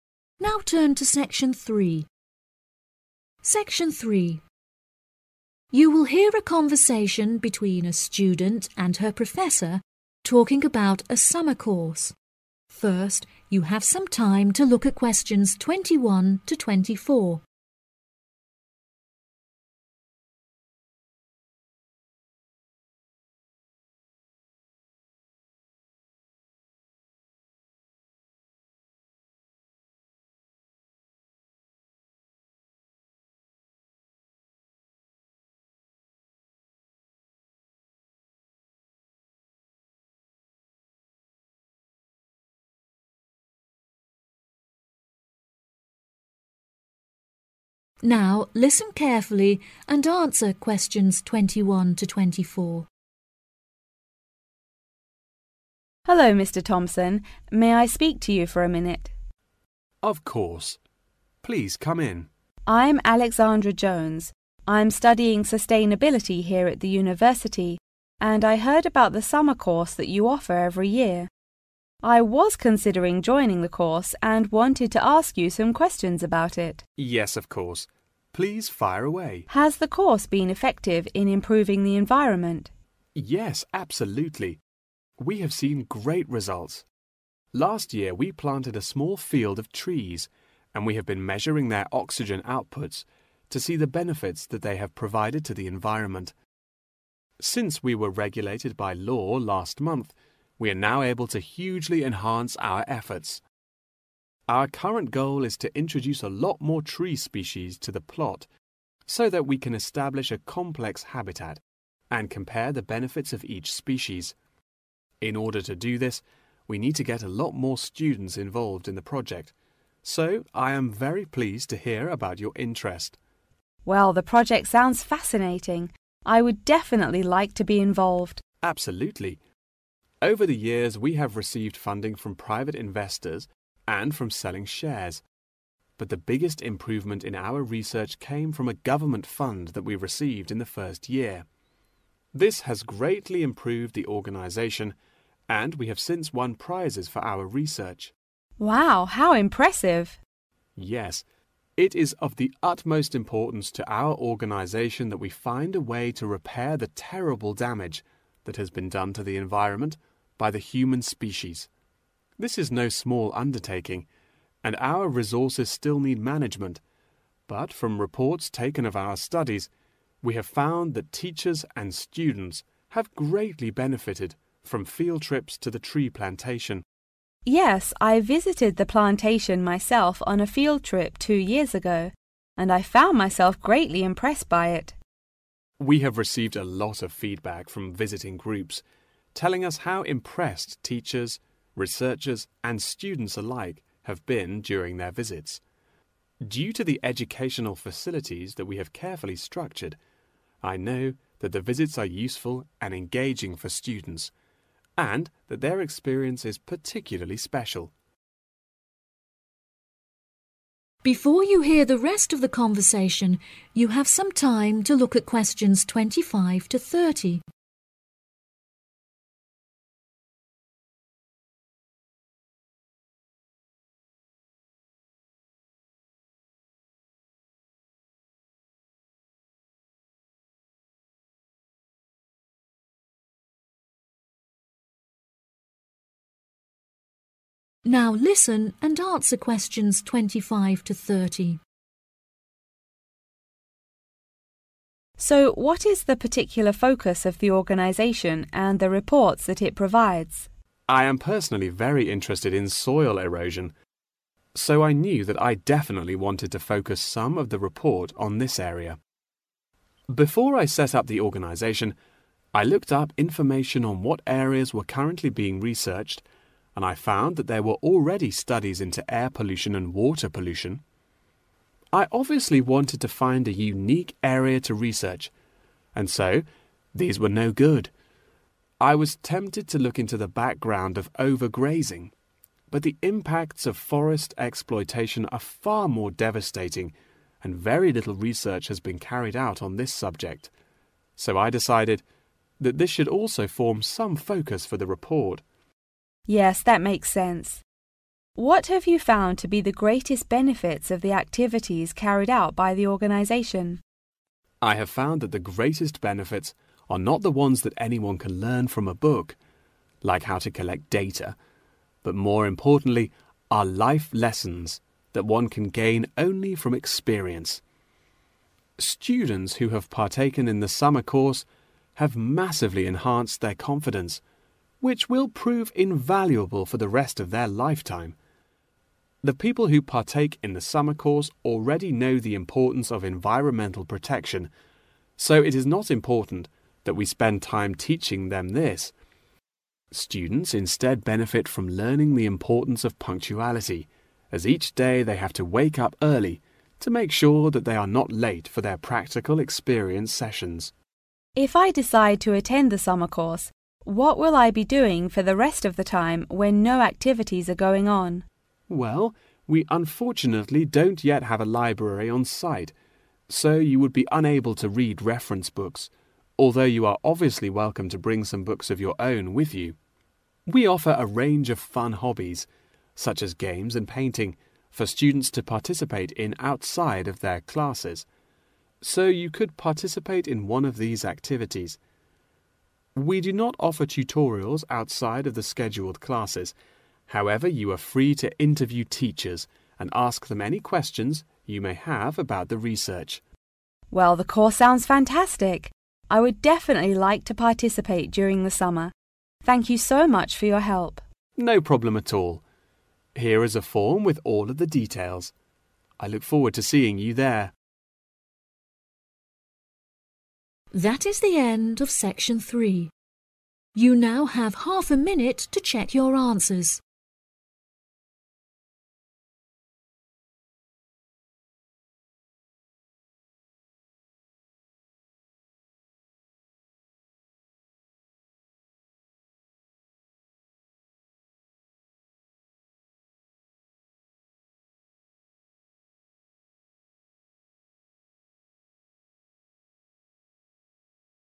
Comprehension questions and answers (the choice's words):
Choose the correct letter A, B or C.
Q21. The course has improved the environment since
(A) it was regulated by law.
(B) more students were involved.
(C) more species were brought from other places.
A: it was regulated by law.

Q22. What is the biggest reason why the organisation improved greatly?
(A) It was funded by a private investor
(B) It sold out its shares.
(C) It got the governmental fund in the first year.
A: It got the governmental fund in the first year.

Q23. What is suggested from the reports?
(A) Resources still need management.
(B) Teachers and the students have benefitted from the field trips.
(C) The environment has been terribly damaged.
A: Teachers and the students have benefitted from the field trips.

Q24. Who did obtain the special experience from the field trip carried out by the organisation?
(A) students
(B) teachers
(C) researchers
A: students